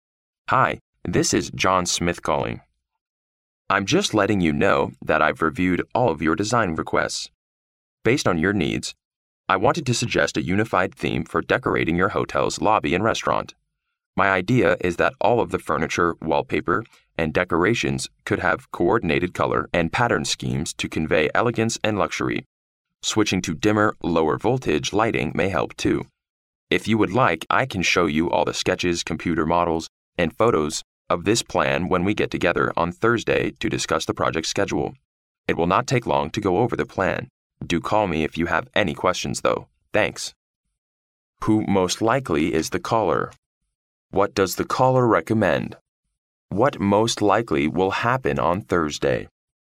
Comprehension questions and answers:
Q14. What does the caller recommend? ______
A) Installing brighter indoor lights.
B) Offering a wider menu selection.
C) Using a specific decorating theme.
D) Modifying a construction schedule.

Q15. What most likely will happen on Thursday? ______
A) A meeting will be held.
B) A project will be completed.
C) A restaurant will be reopened.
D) A computer will be delivered.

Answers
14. C
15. A

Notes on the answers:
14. 题干问的是打电话的人建议了些什么。根据听力原文的"a unified theme"和"have coordinated color and pattern schemes"可知,打电话的人建议的是采用统一的装饰主题。故选C。
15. 题干问的是周四最有可能发生什么事情。根据听力原文的"when we get together on Thursday to discuss the project's schedule"可知,周四他们将为了讨论项目El程碰个面。故选A。

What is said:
[听力原文] Hi, this is John Smith calling. I'm just letting you know that I've reviewed all of your design requests. Based on your needs, I wanted to suggest a unified theme for decorating your hotel's lobby and restaurant. My idea is that all of the furniture, wallpaper, and decorations could have coordinated color and pattern schemes to convey elegance and luxury. Switching to dimmer, lower-voltage lighting may help too. If you would like, I can show you all the sketches, computer models, and photos of this plan when we get together on Thursday to discuss the project's schedule. It will not take long to go over the plan. Do call me if you have any questions, though. Thanks.

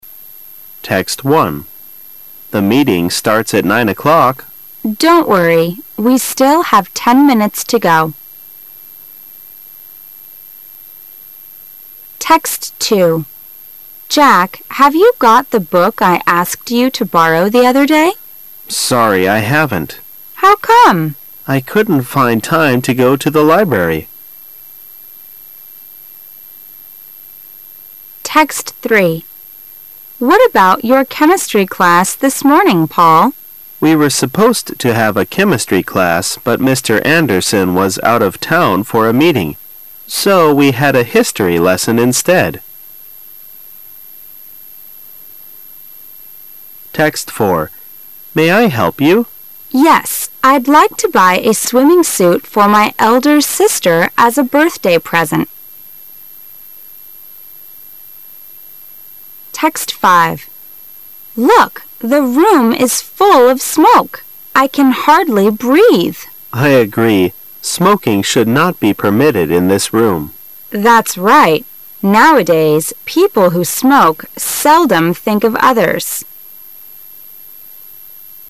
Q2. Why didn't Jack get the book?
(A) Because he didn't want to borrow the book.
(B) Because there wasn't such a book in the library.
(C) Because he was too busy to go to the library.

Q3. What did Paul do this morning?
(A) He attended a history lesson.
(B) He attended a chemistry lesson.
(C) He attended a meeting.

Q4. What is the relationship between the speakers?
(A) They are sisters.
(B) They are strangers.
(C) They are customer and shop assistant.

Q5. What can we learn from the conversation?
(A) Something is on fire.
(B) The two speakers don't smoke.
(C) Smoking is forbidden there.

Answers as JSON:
{"2": "C", "3": "A", "4": "C", "5": "B"}

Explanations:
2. W: Jack, have you got the book I asked you to borrow the other day? M: Sorry, I haven't. W: How come ? M: I couldn't find time to go to the library.
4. M: May I help you? W: Yes, I'd like to buy a swimming suit for my elder sister as a birthday present.

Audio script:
[解析] W: Jack, have you got the book I asked you to borrow the other day? M: Sorry, I haven't. W: How come ? M: I couldn't find time to go to the library.
A
[解析] W: What about your chemistry class this morning, Paul? M: We were supposed to have a chemistry class but Mr. Anderson was out of town for a meeting, so we had a history lesson instead.
[解析] M: May I help you? W: Yes, I'd like to buy a swimming suit for my elder sister as a birthday present.
[解析] W: Look, the room is full of smoke. I can hardly breathe. M: I agree. Smoking should not be permitted in this room. W: That's right. Nowadays, people who smoke seldom think of others.

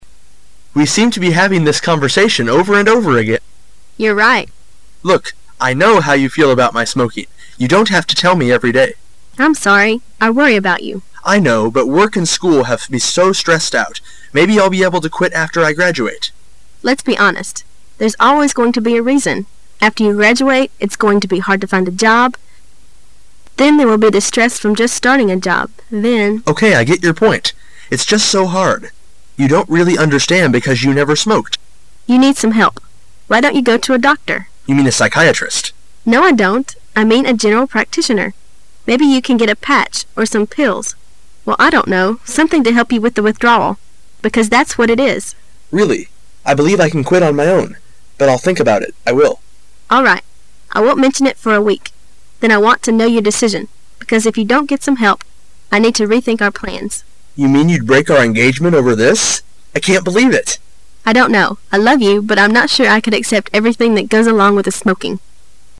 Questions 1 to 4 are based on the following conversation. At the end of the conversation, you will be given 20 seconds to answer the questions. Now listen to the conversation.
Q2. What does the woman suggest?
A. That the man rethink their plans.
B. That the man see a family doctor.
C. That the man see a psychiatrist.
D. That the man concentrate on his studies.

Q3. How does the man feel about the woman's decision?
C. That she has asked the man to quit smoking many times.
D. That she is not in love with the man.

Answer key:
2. B
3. C

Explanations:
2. [解析] 这里考的是细节。可以边听边做出选择。 [详细解答] 先浏览题支。主要的话题是smoking,当然就要提到戒烟了,C具有迷惑性,听的时候一定要注意否定词,"you mean a psychiatrist""No,I don't"由此可以得出正确答案。
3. [解析] 这是一道推理题。需要先听明白,再做推理。 [详细解答] 根据"You don't have to tell me every-day"可以判断出C为正确选项。B和D有一定的迷惑性,但是谈话中女士提到"I love you,but I'm not sure I could accept everything that goes along with the smoking",可以推测B和D是错误的。

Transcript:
[解析] 1-4 M: We seem to be having this conversation over and over again. W: You're right. M: Look, I know how you feel about my smoking. You don't have to tell me every day. W:I'm sorry. I worry about you. M:I know. But work and school have me so stressed out. Maybe I'll be able to quit after I graduate. W: Let's be honest. There's always going to be a reason. After you graduate, it's going to be hard to find a job, then there will be the stress from just starting a job, then. M: Okay, I get your point. It's just so hard. You don't really understand because you never smoked. W: You need some help. Why don't you go to a doctor? M: You mean a psychiatrist. W: No, I don't. I mean a general practitioner. Maybe you can get a patch, or some pills well, I don't know, something to help you with the withdrawal. Because that's what it is. M: Really, I believe I can quit on my own. But I'll think about it. I will. W: All right. I won't mention it for a week. Then I want to know your decision. Because if you don't get some help, I need to rethink our plans. M: You mean you'd break our engagement over this? I can't believe it! W: I don't know. I love you, but I'm not sure I could accept everything that goes along with the smoking.

